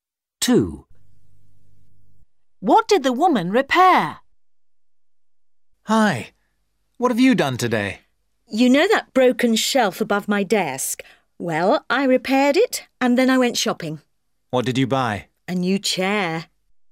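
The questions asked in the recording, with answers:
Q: What did the woman repair?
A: A shelf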